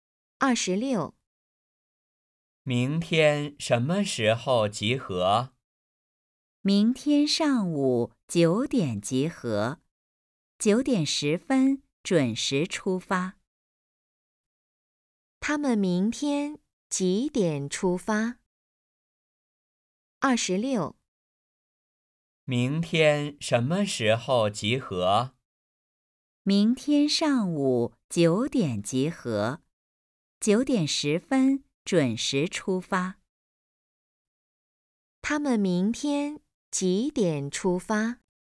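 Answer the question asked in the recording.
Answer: 上午九点十分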